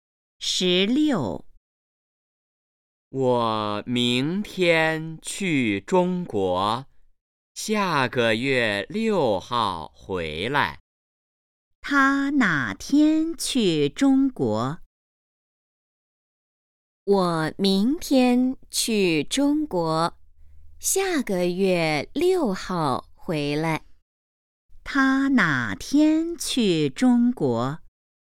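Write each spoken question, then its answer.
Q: 他哪天去中国?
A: 明天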